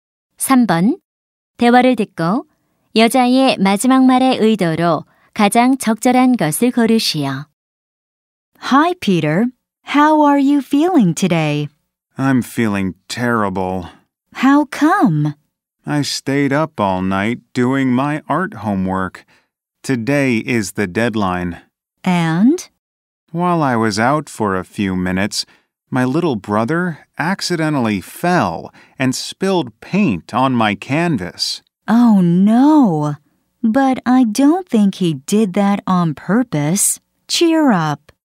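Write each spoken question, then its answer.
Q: 대화를 듣고 여자의 마지막 말의 의도로 가장 적절한 것을 고르시오.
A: 위로하기(격려하기)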